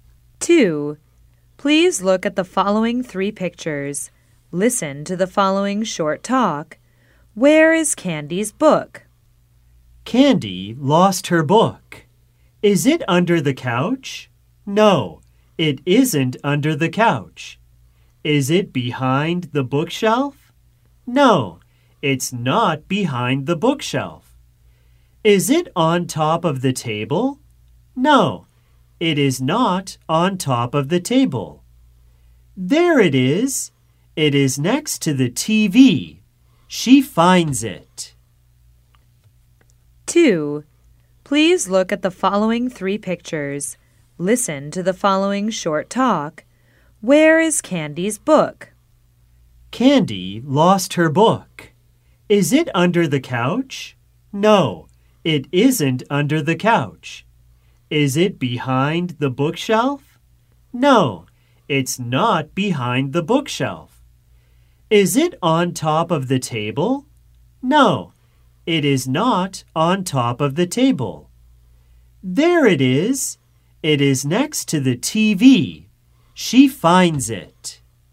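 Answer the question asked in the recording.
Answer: Next to the TV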